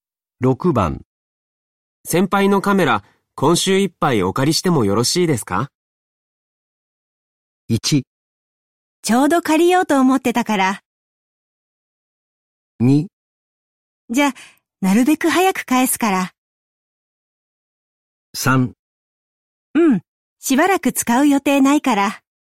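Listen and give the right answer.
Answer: 3: うん、しばらく使う予定ないから。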